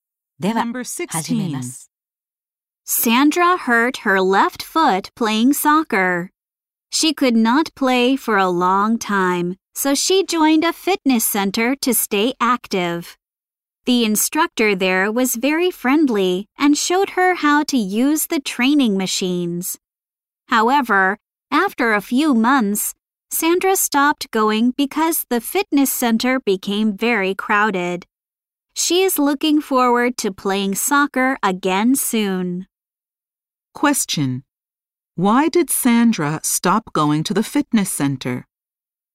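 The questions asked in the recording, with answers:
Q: Why did Sandra stop going to the fitness center?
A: It became very crowded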